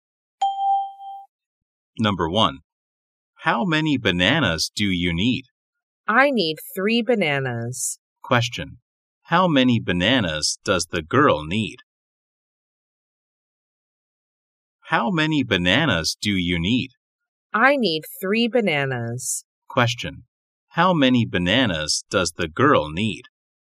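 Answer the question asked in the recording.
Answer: Three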